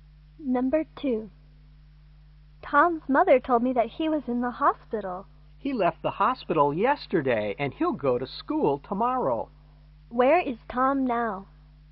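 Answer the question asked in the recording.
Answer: At home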